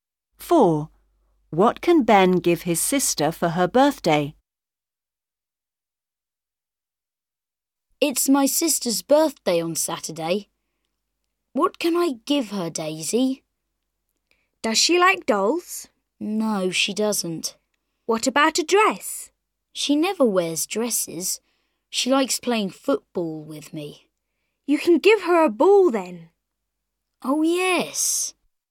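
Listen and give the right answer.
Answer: a ball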